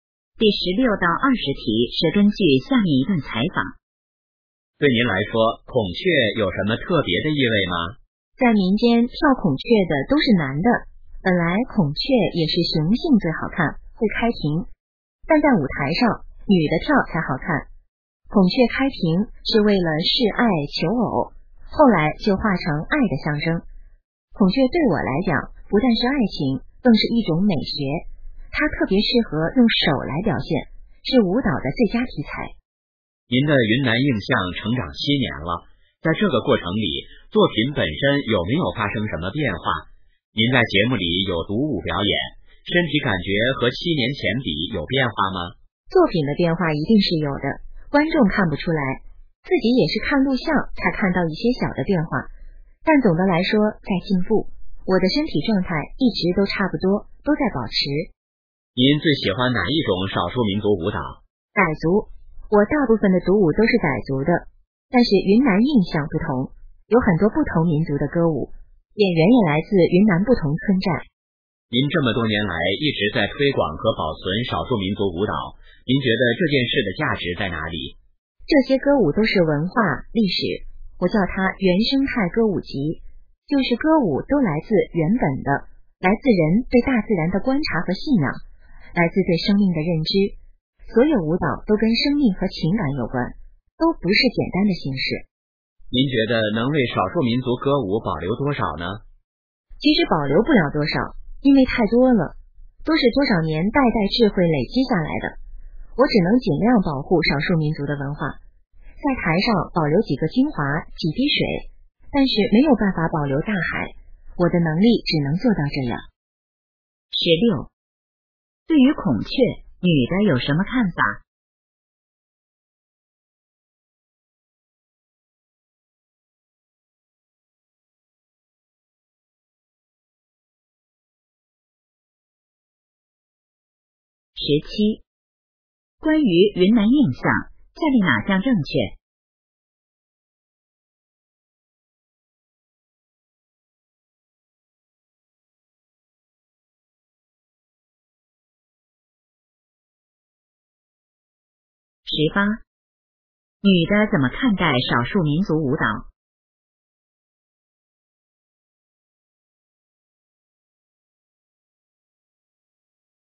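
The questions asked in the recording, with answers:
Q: 对于孔雀女的有什么看法?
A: 不但代表爱情,更是一种美学,是舞蹈的最佳题材

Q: 女的怎么看待少数民族舞蹈?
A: 是文化历史,都跟生命和情感有关

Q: 女的说没有办法保留大海是什么意思?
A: 少数民族歌舞太多,只能保留少数精华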